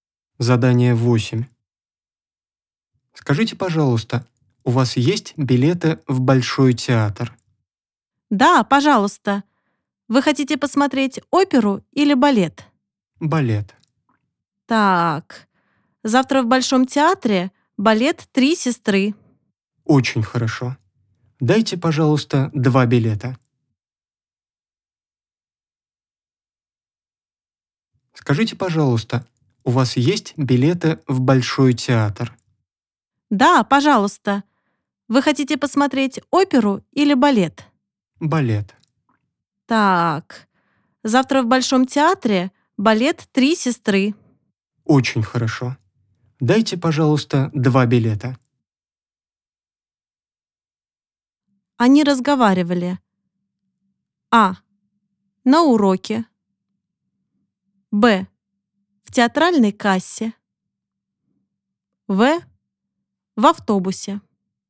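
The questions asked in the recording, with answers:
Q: Они разговаривали.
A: Б: В театральной кассе.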